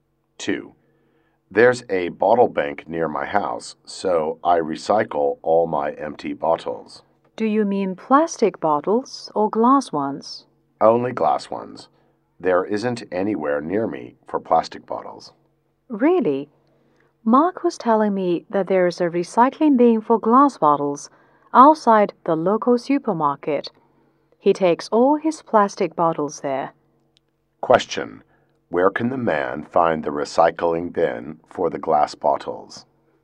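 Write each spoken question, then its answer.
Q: Where can the man find the recycling bin for the glass bottles?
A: Outside the local supermarket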